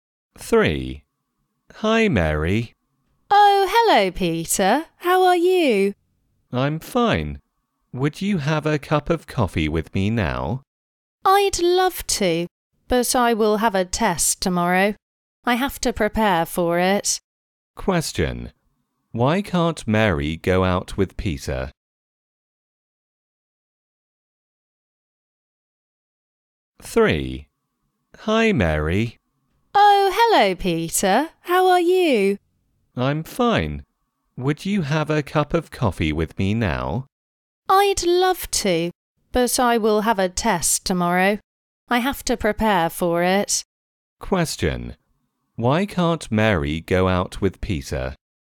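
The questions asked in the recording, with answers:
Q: Why can't Mary go out with Peter?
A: She has to prepare for a test tomorrow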